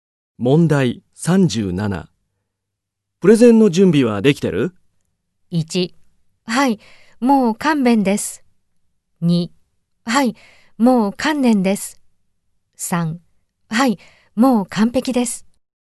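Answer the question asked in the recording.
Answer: 3: はい、もう完璧です。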